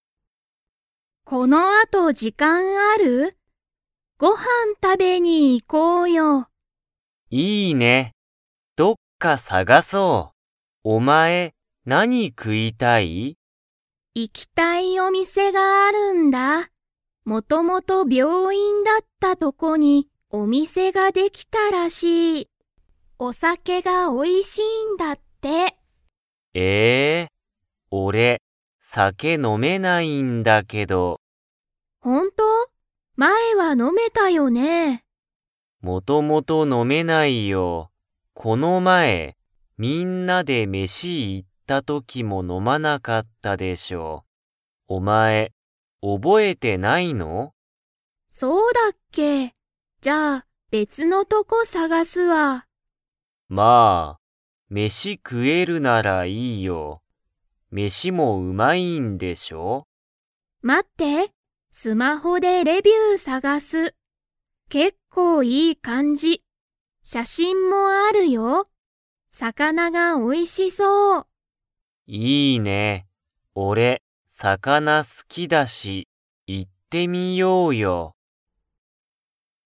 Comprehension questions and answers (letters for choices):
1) 高尾たかおさんは、お酒さけが 。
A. 飲のめる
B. 飲のめない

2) 二人ふたりは、どこに行いきますか?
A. 病院びょういん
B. スマホを買かえるお店みせ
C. 小島こじまさんの行いきたいお店みせ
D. お酒さけが飲のめないお店みせ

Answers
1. B
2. C

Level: Level 3